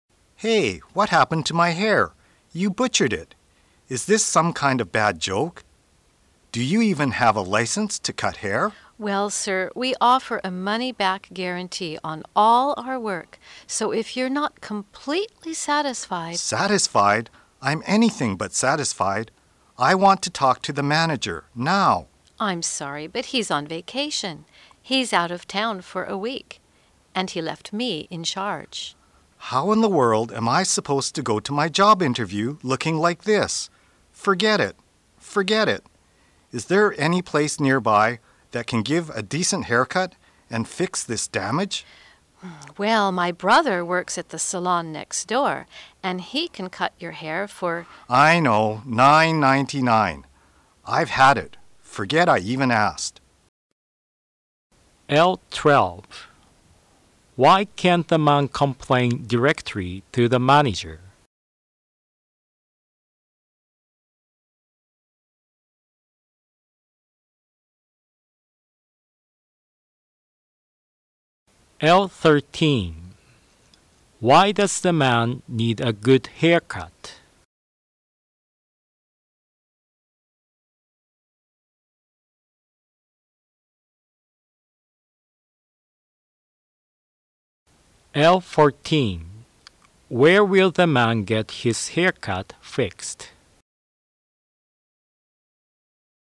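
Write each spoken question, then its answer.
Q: Why can't the man complain directly to the manager?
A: The manager is on vacation, out of town for a week

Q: Why does the man need a good haircut?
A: He has a job interview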